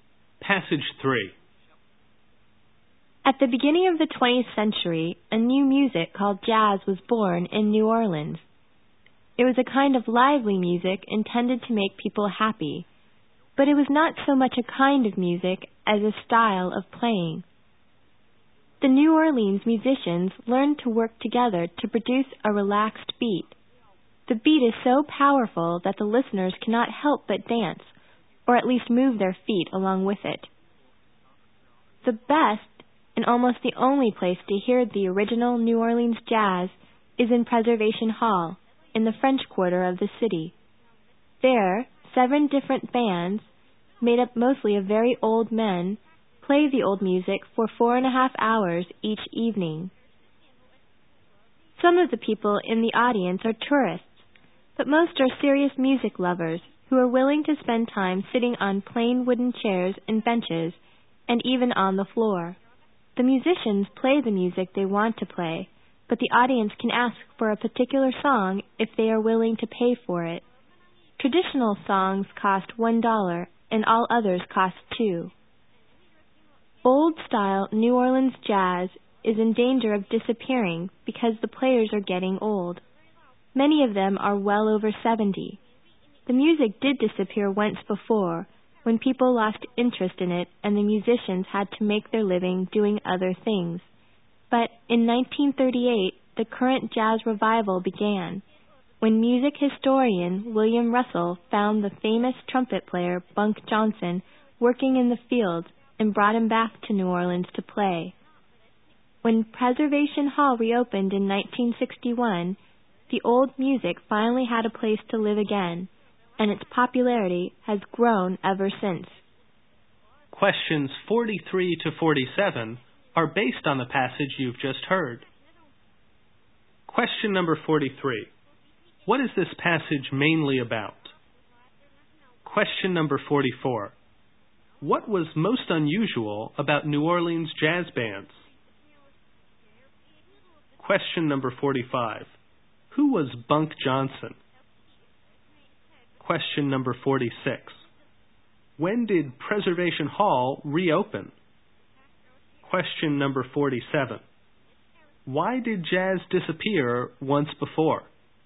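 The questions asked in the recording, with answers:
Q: What is this passage mainly about?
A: Old-style New Orleans jazz

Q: What was most unusual about New Orleans jazz bands?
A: They were made up mostly of very old men

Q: Who was Bunk Johnson?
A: A famous trumpet player

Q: When did Preservation Hall reopen?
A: In 1961

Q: Why did jazz disappear once before?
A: People lost interest in it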